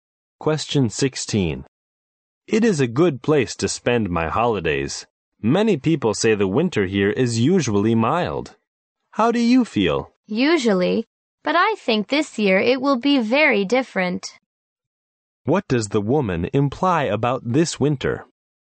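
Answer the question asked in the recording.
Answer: This winter probably won't be mild.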